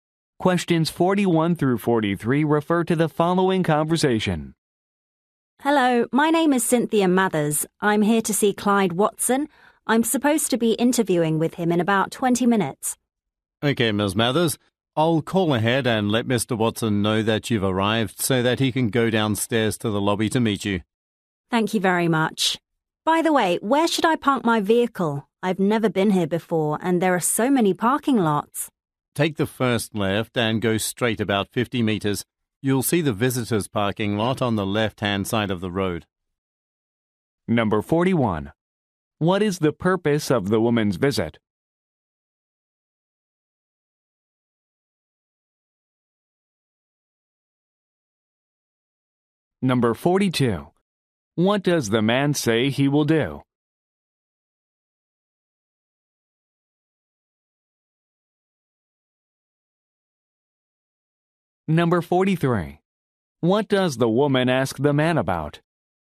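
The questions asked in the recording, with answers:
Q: What is the purpose of the woman's visit?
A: A job interview

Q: What does the man say he will do?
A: Call Mr. Watson to tell him she has arrived

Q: What does the woman ask the man about?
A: Where to park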